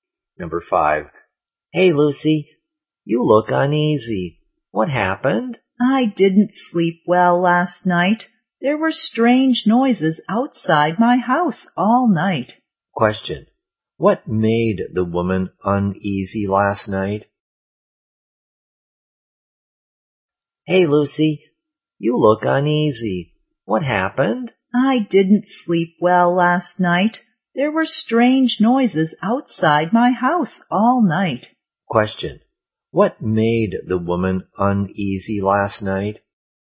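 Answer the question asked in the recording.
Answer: Strange noises outside her house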